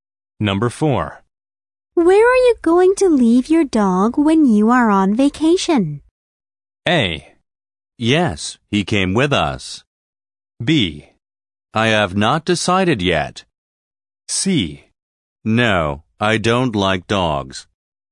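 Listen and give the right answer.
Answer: B: I have not decided yet.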